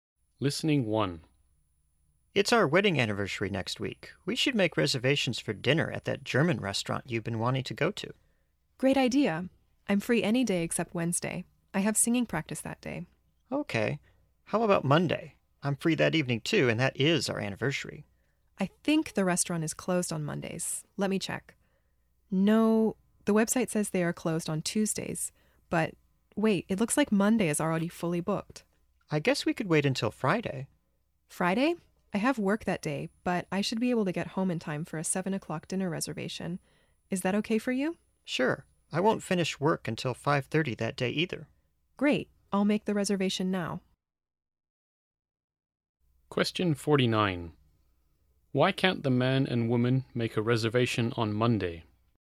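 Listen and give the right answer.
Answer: The restaurant is already fully booked on Monday.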